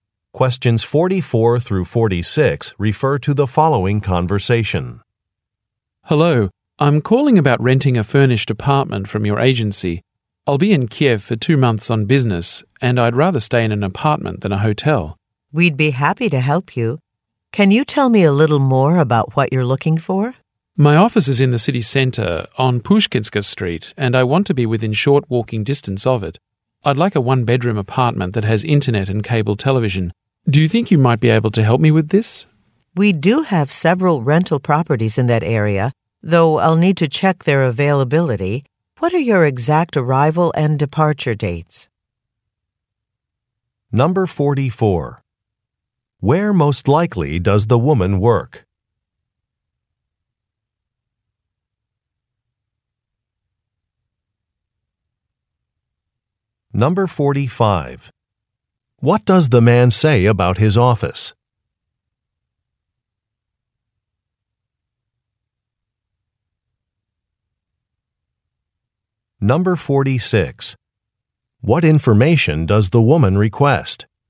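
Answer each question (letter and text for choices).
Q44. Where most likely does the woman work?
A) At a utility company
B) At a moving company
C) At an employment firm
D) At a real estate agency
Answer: D) At a real estate agency

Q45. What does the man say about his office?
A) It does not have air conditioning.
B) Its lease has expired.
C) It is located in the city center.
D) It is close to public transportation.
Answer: C) It is located in the city center.

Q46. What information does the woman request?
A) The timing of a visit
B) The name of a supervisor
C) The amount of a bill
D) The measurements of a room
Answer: A) The timing of a visit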